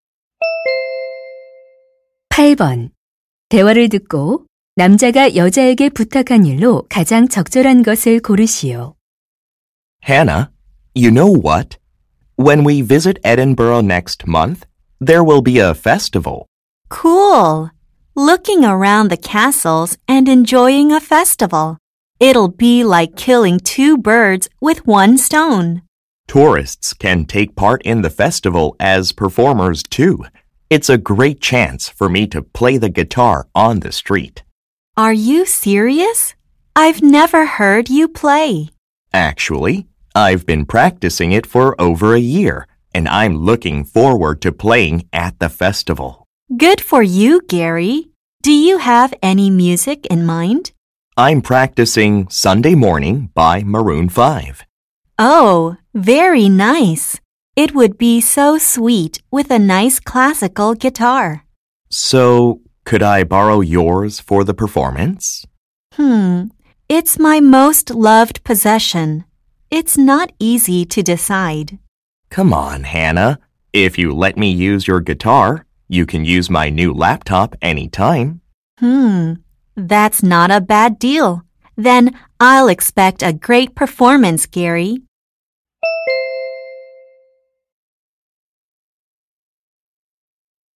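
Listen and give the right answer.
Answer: 기타 빌려주기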